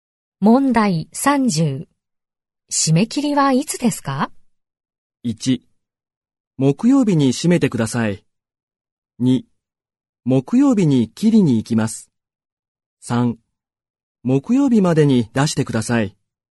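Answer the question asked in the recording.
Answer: 3: 木曜日までに出してください。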